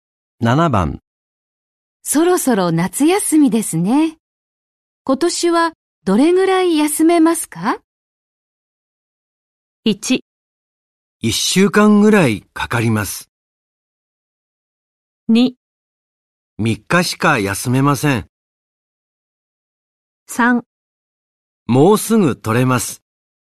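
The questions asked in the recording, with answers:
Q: そろそろ夏休みですね。今年はどれぐらい休めますか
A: 2: 3日しか休めません。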